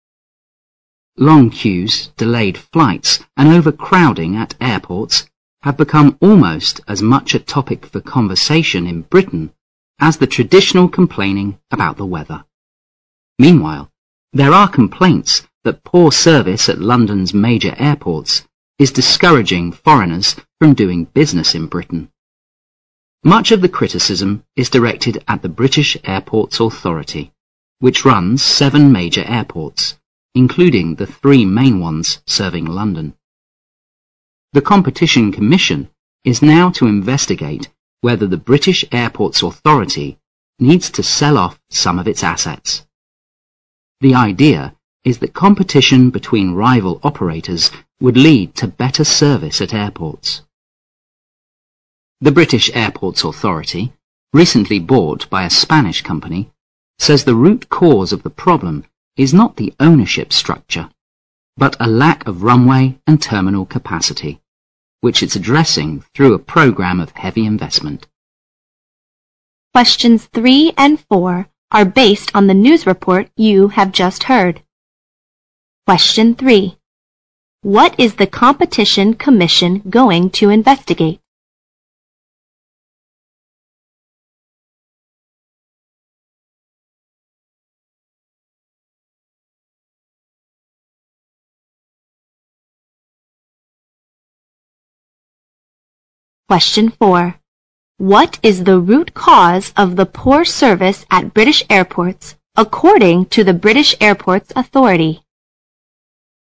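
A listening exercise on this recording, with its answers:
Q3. What is the Competition Commission going to investigate?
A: Whether the British Airports Authority needs to sell off some of its assets

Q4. What is the root cause of the poor service at British airports according to the British Airports Authority?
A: A lack of runway and terminal capacity

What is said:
Long queues, delayed flights and overcrowding at airports have become almost as much a topic for conversation in Britain as the traditional complaining about the weather. Meanwhile, there are complaints that poor service at London's major airports is discouraging foreigners from doing business in Britain. Much of the criticism is directed at the British Airports Authority, which runs seven major airports, including the three main ones serving London. The Competition Commission is now to investigate whether the British Airports Authority needs to sell off some of its assets. 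The idea is that competition between rival operators would lead to better service at airports. The British Airports Authority, recently bought by a Spanish company, says the root cause of the problem is not the ownership structure but a lack of runway and terminal capacity, which it is addressing through a program of heavy investment.
Questions 3 and 4 are based on the news report you have just heard.
Question 3. What is the Competition Commission going to investigate?
Question 4. What is the root cause of the poor service at British airports according to the
British Airports Authority?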